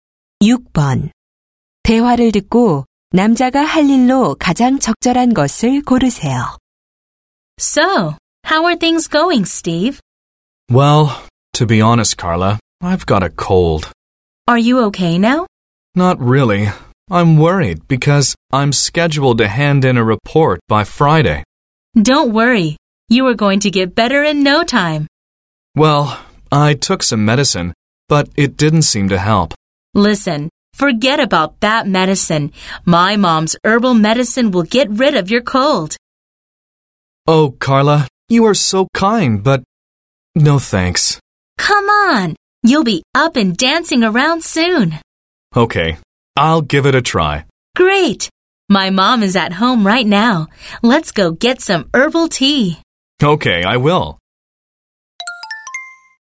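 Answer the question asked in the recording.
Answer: 여자의 집에 가서 한방차(약)를 마시기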